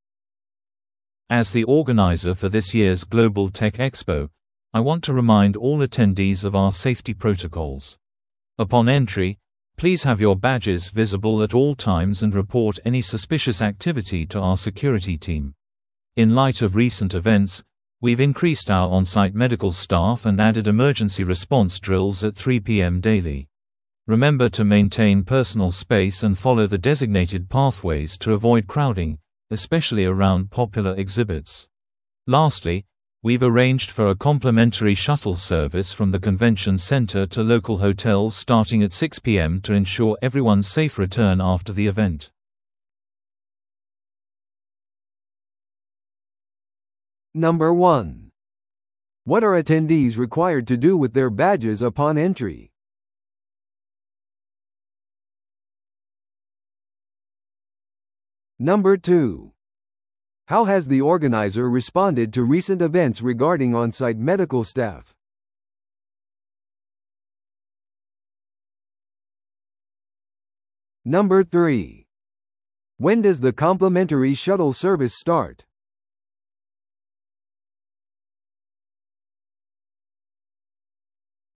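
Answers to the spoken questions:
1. Keep them visible at all times
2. Increased the on-site medical staff
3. At 6 p.m.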